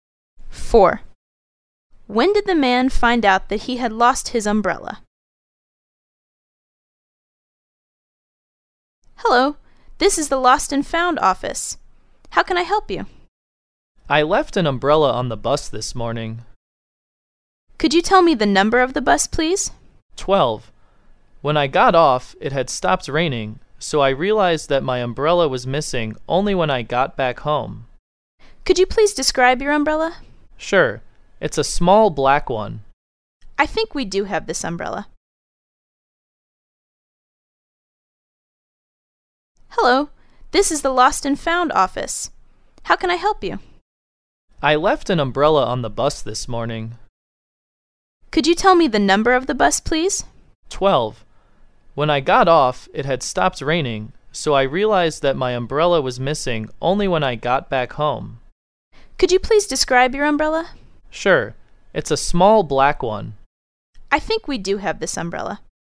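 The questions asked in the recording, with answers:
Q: When did the man find out that he had lost his umbrella?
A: When he got back home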